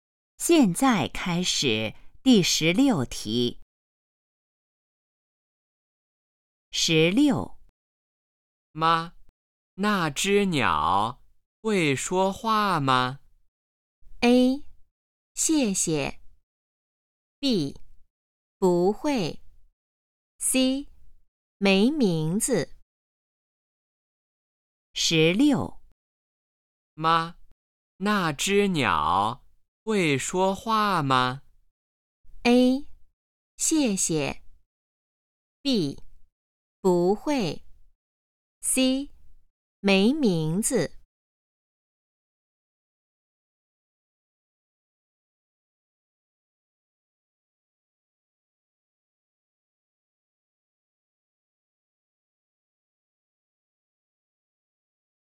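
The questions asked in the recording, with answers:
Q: 妈,那只鸟会说话吗?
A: B: 不会。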